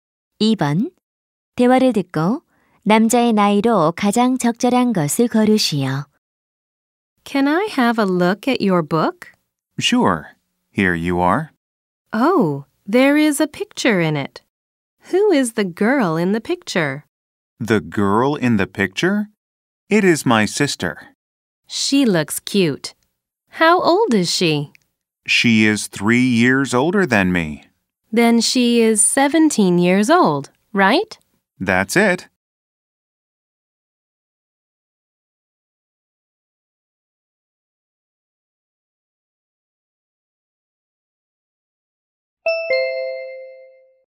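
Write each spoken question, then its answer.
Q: 대화를 듣고 남자의 나이로 가장 적절한 것을 고르시오.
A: 14살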